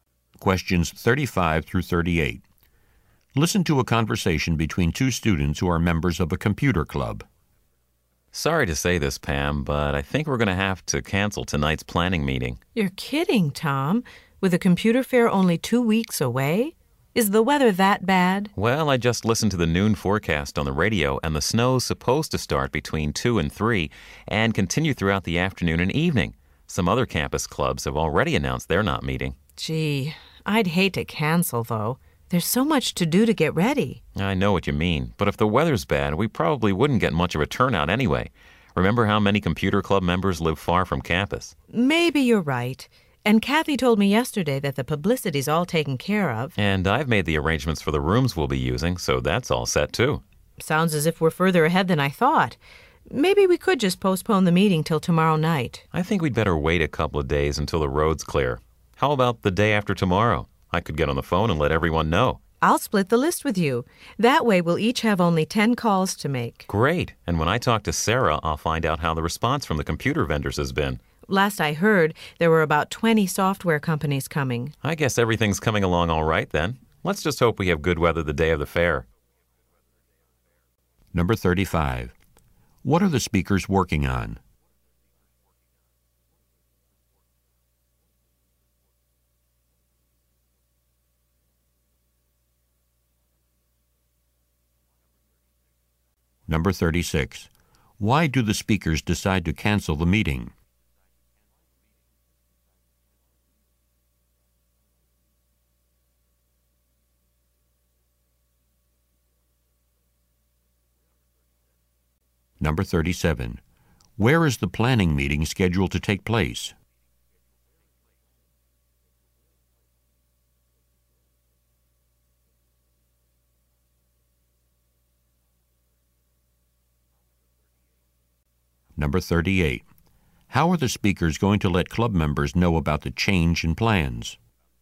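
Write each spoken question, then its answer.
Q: What are the speakers working on?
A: Planning a computer fair

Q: Why do the speakers decide to cancel the meeting?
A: Because of the snowstorm forecast

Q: How are the speakers going to let club members know about the change in plans?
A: By telephoning them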